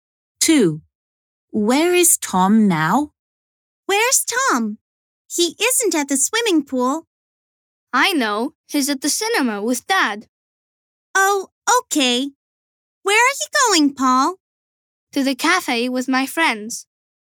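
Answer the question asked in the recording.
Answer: at the cinema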